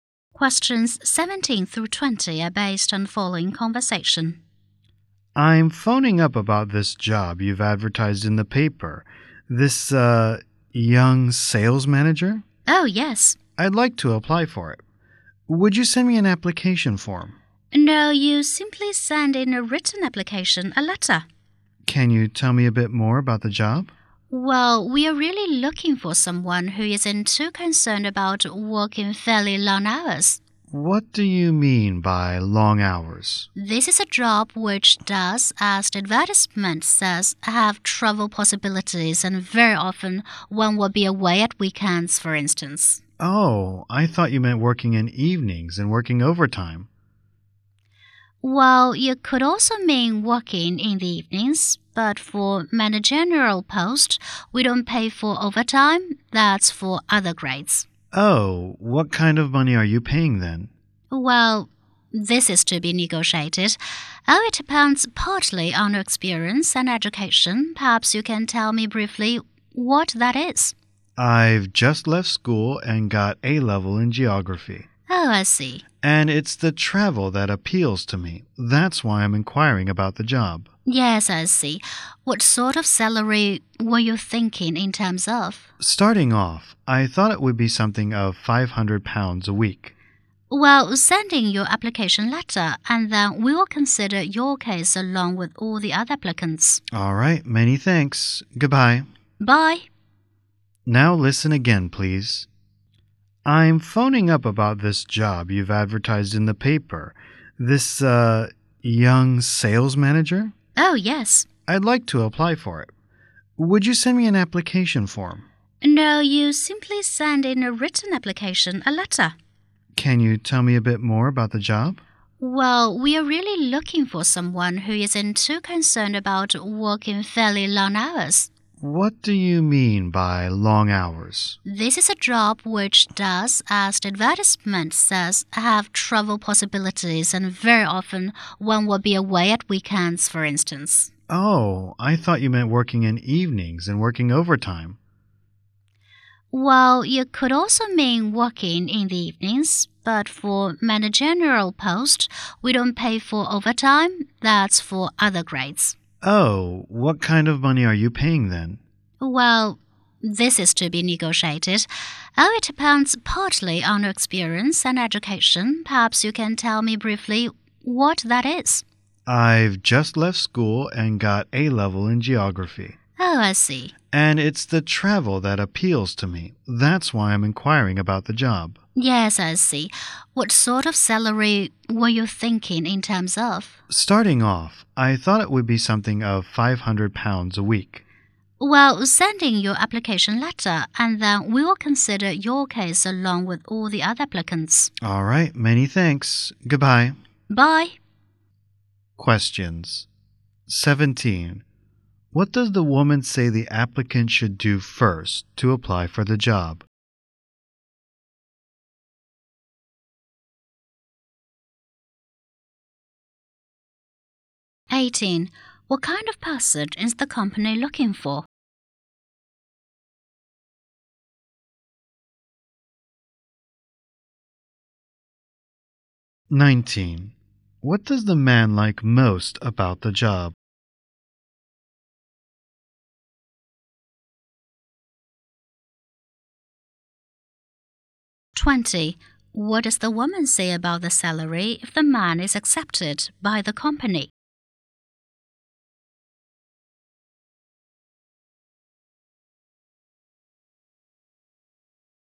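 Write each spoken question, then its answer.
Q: What does the woman say the applicant should do first to apply for the job?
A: Send in a written application letter

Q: What kind of person is the company looking for?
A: Someone not too concerned about working long hours

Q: What does the man like most about the job?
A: The travel

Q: What does the woman say about the salary if the man is accepted by the company?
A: It is to be negotiated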